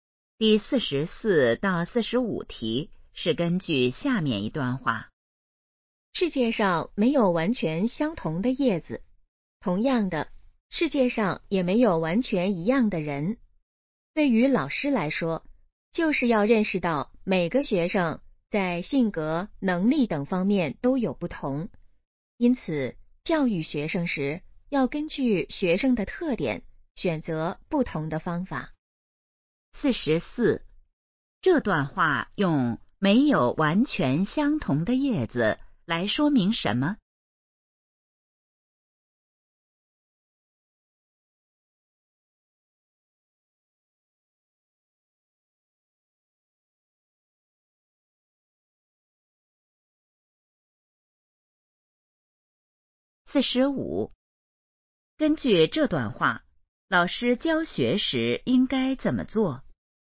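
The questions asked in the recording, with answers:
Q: 这段话用没有完全相同的叶子来说明什么?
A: 每个人都不一样

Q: 根据这段话,老师教学时应该怎么做?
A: 根据学生的特点选择不同的方法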